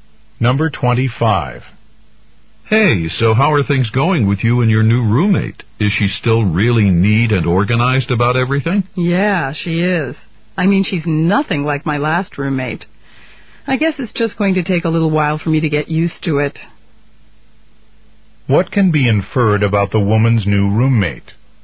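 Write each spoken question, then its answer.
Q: What can be inferred about the woman's new roommate?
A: She's much neater than the woman's last roommate.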